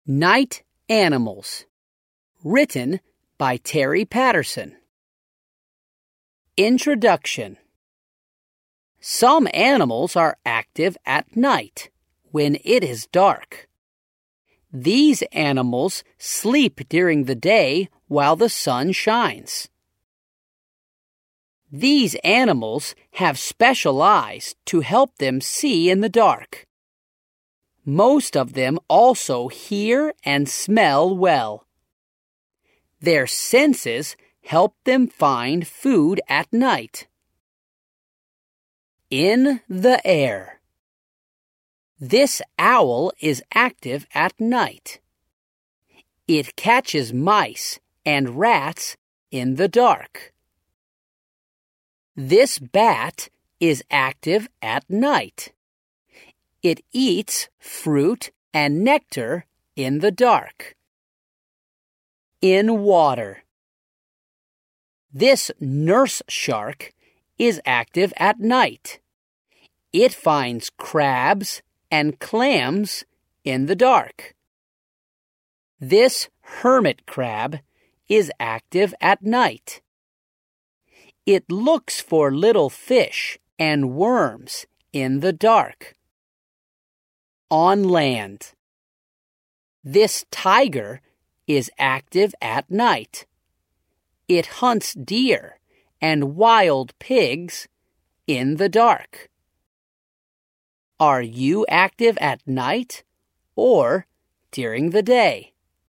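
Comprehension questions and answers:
After the story, let's think about these questions.听完故事后,我们来思考一下这些问题:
What do these animals have in common? (请问这些动物的共通点是什么?)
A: They are active at night and have special eyes to see in the dark.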